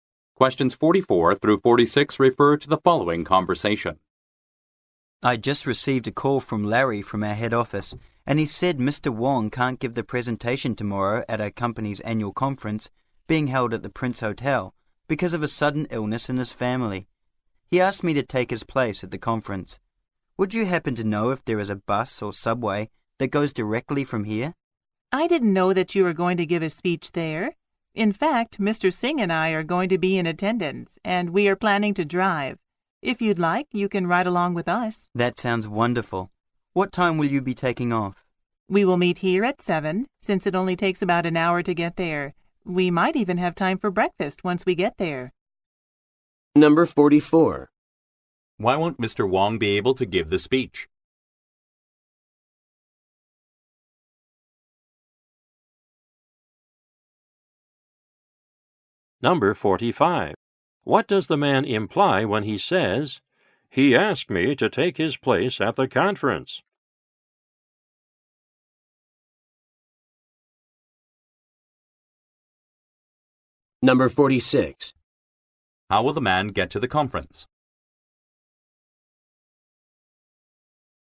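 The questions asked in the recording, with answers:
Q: Why won't Mr. Wong be able to give the speech?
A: Because of a sudden illness in his family

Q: How will the man get to the conference?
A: He will ride in the car with the woman and Mr. Singh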